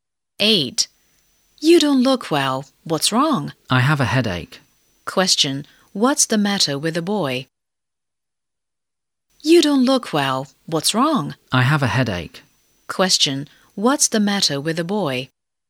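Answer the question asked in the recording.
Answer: He has a headache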